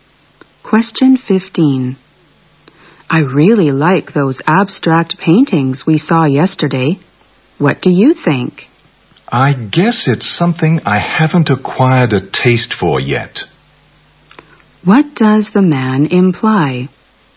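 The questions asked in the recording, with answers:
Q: What does the man imply?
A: He doesn't appreciate abstract paintings yet.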